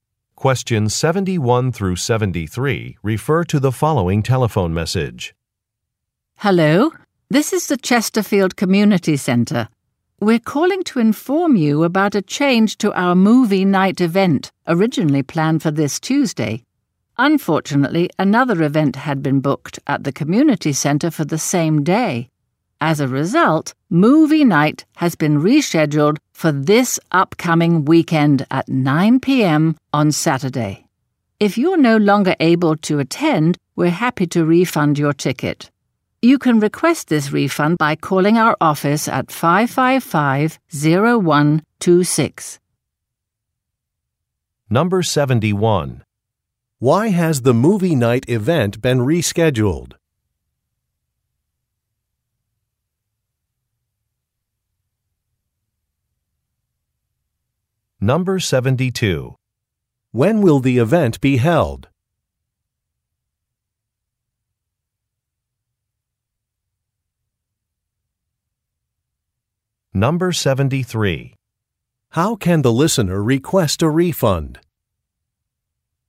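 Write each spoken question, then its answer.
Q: Why has the movie night event been rescheduled?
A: Another event was booked at the community center for the same day

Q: When will the event be held?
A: Saturday at 9 p.m.

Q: How can the listener request a refund?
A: By calling the office at 555-0126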